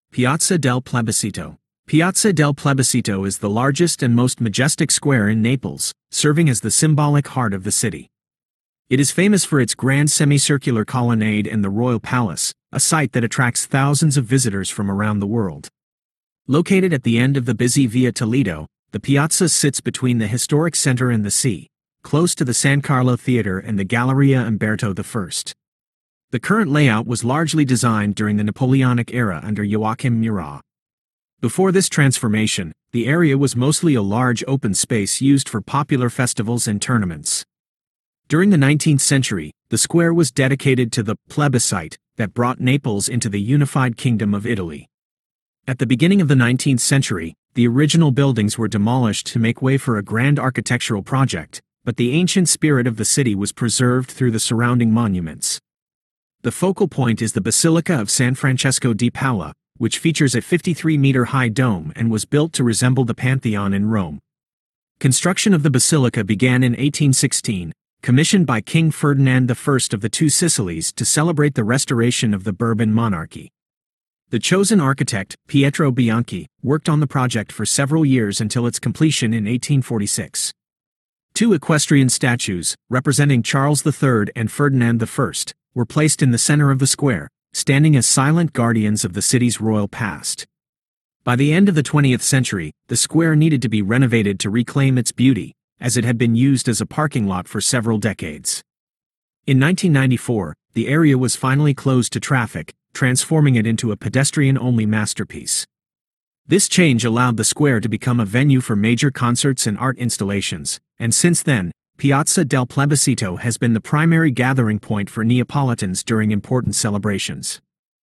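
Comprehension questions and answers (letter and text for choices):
Listen to the audio about the Piazza del Plebiscito and answer the questions.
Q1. What historical event is the square named after?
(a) The construction of the Royal Palace.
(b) The vote that integrated Naples into the unified Kingdom of Italy.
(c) The arrival of Napoleon Bonaparte in the city.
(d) The end of the Bourbon monarchy rule.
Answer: (b) The vote that integrated Naples into the unified Kingdom of Italy.

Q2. Which famous Roman monument inspired the design of the Basilica of San Francesco di Paola?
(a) The Colosseum.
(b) The Pantheon.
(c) St. Peter's Basilica.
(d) The Roman Forum.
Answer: (b) The Pantheon.

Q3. What controversial use did the square have for several decades during the 20th century?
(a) It was used as a public fish market.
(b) It was used as a military training ground.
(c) It served as a large parking lot for vehicles.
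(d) It was closed for archaeological excavations.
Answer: (c) It served as a large parking lot for vehicles.

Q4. Who are the two figures represented by the equestrian statues in the center of the square?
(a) Joachim Murat and Napoleon Bonaparte.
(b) Charles III and Ferdinand I.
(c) Victor Emmanuel II and Garibaldi.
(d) Augustus and Julius Caesar.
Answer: (b) Charles III and Ferdinand I.

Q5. When was the square finally closed to traffic and turned into a pedestrian masterpiece?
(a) In 1846, after the completion of the Basilica.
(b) In 1816, by commission of King Ferdinand I.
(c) In 1994.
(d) During the Napoleonic era.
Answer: (c) In 1994.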